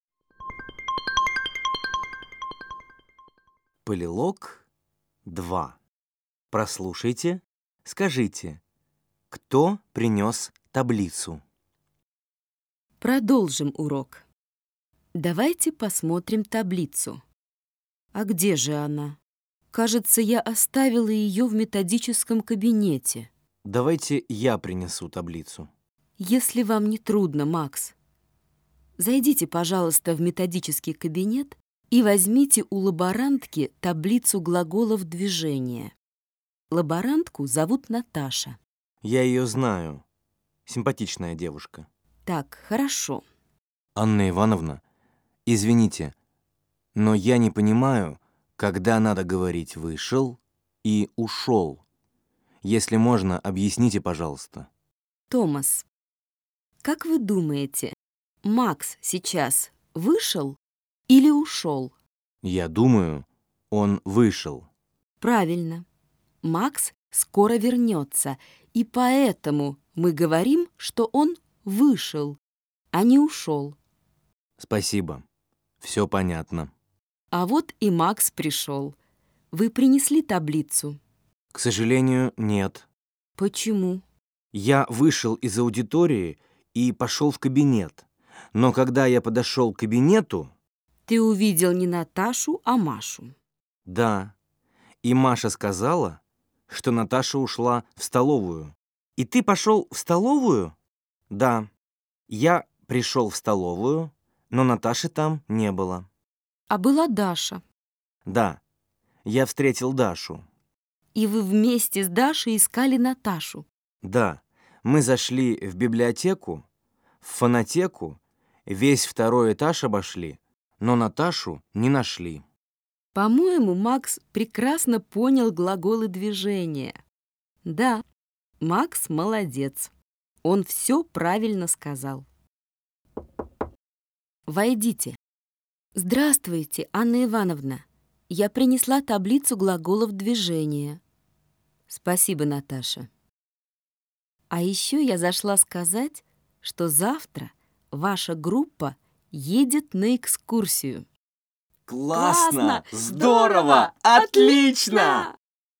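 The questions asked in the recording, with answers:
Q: Прослушайте, скажите, кто принес таблицу?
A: Наташа (лаборантка)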